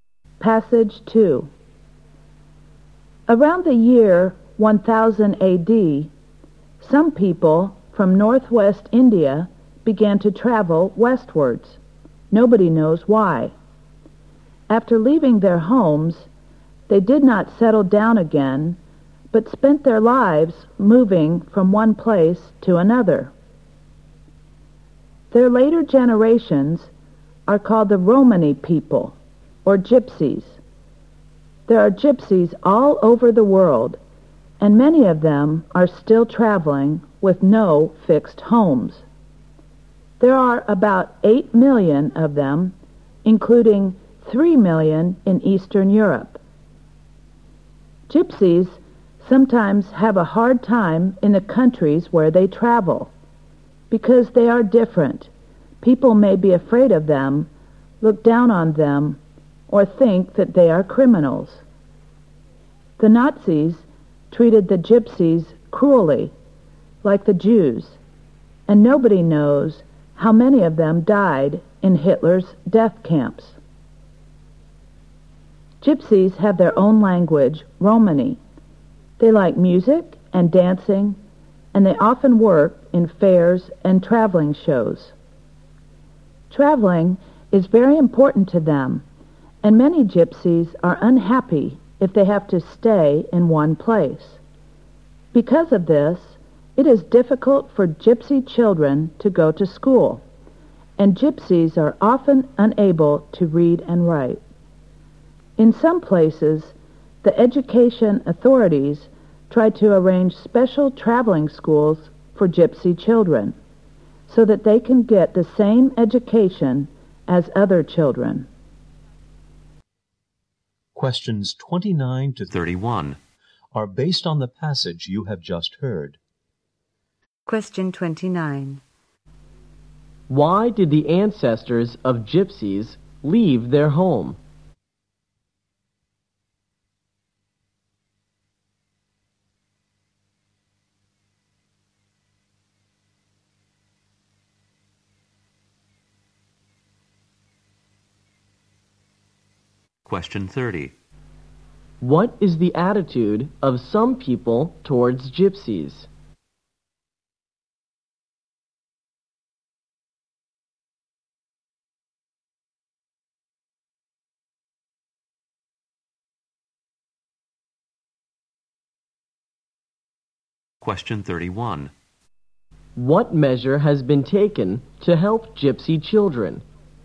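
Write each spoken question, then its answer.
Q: Why did the ancestors of gypsies leave their home?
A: Nobody knows

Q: What is the attitude of some people towards gypsies?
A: They fear them, look down on them or think they are criminals

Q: What measure has been taken to help gypsy children?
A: Special traveling schools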